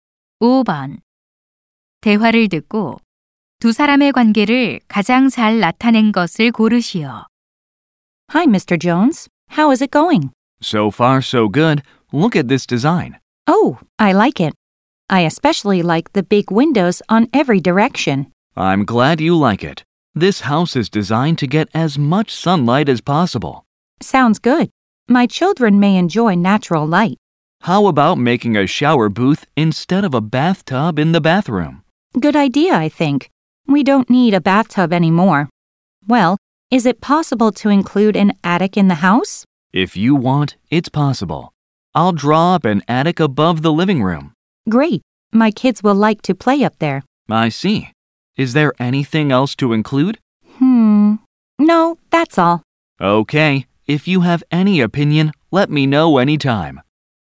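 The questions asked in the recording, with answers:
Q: 대화를 듣고 두 사람의 관계를 가장 잘 나타낸 것을 고르시오.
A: 건축가 - 의뢰인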